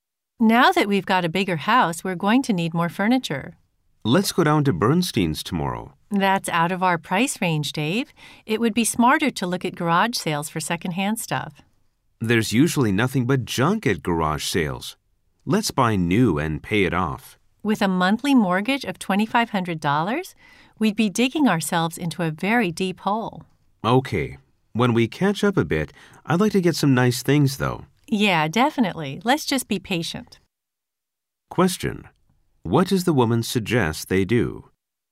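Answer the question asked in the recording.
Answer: Look for secondhand furniture at garage sales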